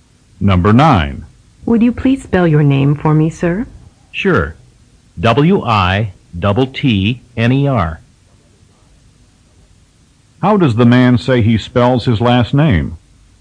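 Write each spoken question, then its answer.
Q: How does the man say he spells his last name?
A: W-I-T-T-N-E-R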